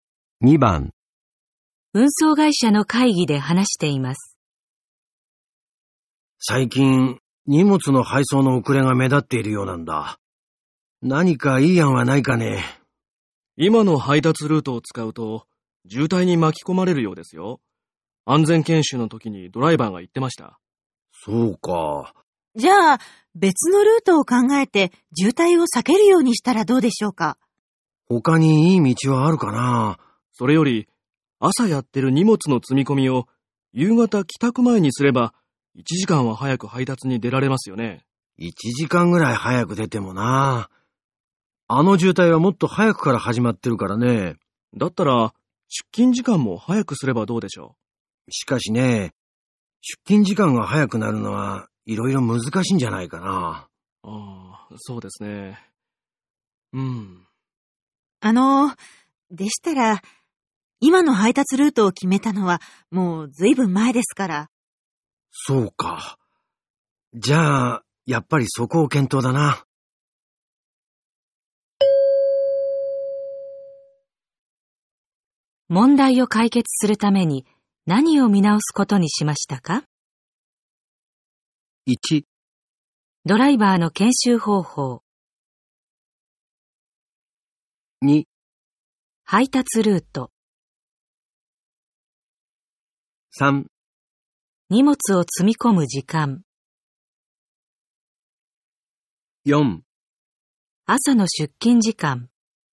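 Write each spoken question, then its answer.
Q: 問題を解決するために何を見直すことにしましたか?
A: 2: 配達ルート。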